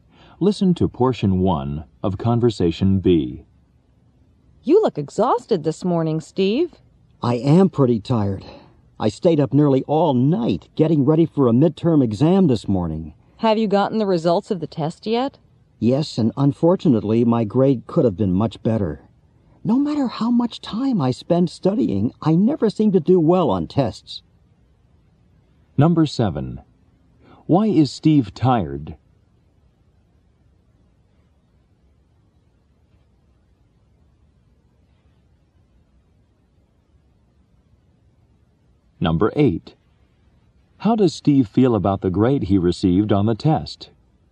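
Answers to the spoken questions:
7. He stayed up nearly all night studying for a midterm exam.
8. Disappointed; he thinks it could have been much better.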